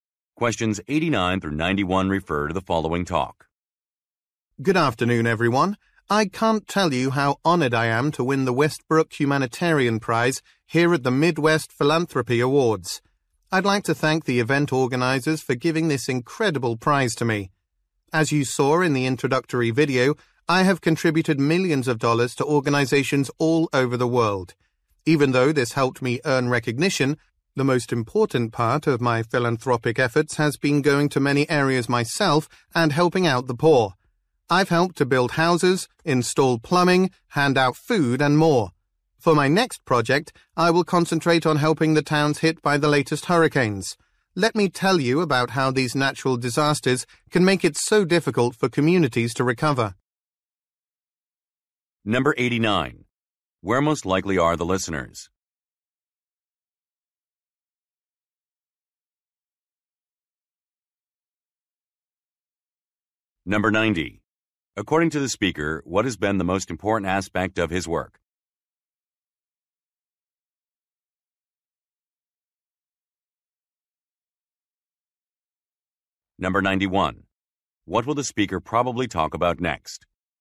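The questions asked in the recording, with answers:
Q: Where most likely are the listeners?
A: At an awards ceremony

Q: According to the speaker, what has been the most important aspect of his work?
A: Personally going to areas to help the poor

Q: What will the speaker probably talk about next?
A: How natural disasters make recovery difficult for communities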